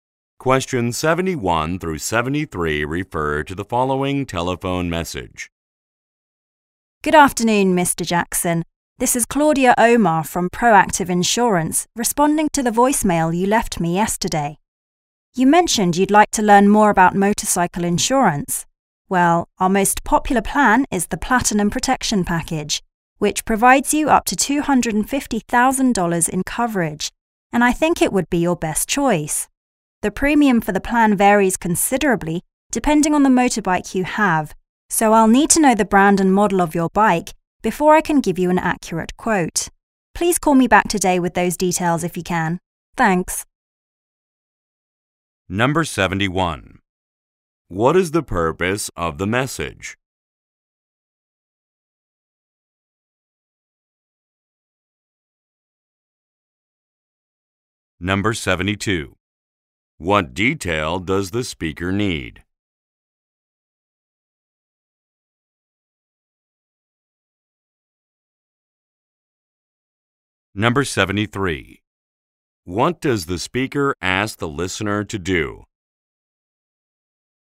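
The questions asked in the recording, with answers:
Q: What is the purpose of the message?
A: To respond to an inquiry about motorcycle insurance

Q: What detail does the speaker need?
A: The brand and model of the bike

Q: What does the speaker ask the listener to do?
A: Call back today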